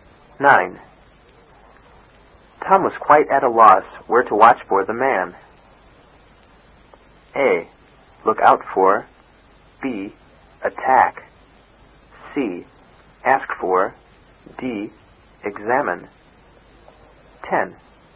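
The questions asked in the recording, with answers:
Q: Tom was quite at a loss where to watch for the man.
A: A: Look out for.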